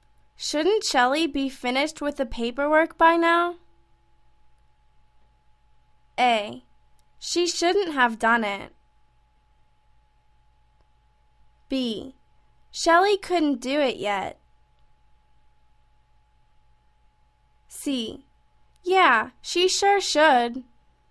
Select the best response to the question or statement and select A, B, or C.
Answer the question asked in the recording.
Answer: Yeah, she sure should.